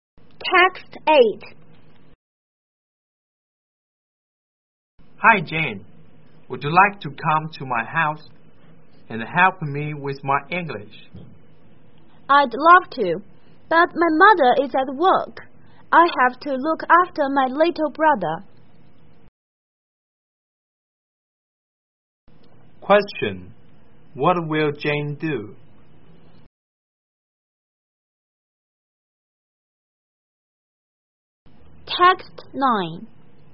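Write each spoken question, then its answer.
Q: What will Jane do?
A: Look after her little brother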